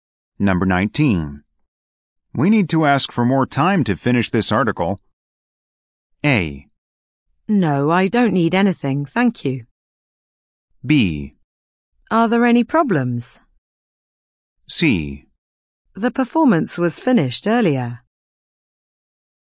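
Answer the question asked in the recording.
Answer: B: Are there any problems?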